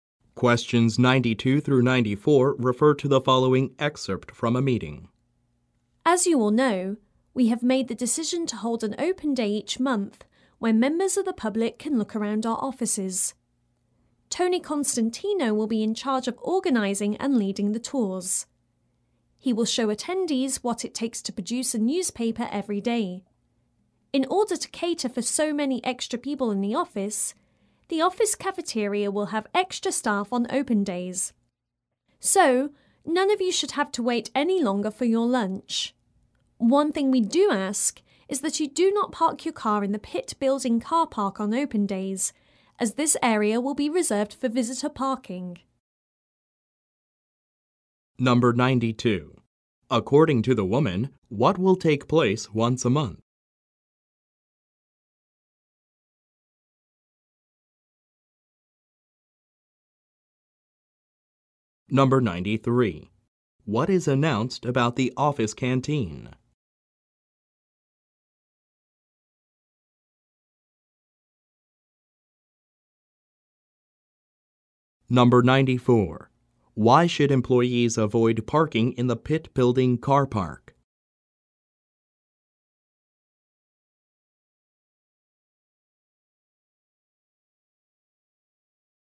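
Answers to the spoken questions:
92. An open day when the public can tour the offices
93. It will have extra staff on open days
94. It will be reserved for visitor parking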